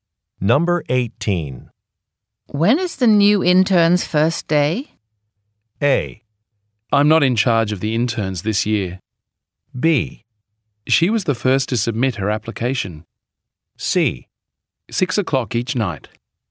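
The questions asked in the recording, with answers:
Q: When is the new intern's first day?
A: A: I'm not in charge of the interns this year.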